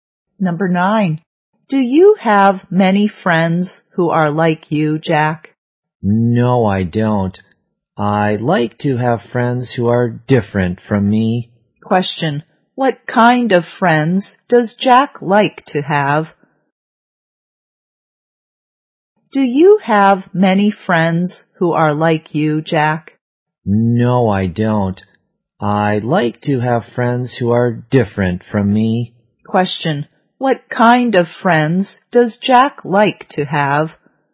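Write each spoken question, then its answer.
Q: What kind of friends does Jack like to have?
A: Friends who are different from him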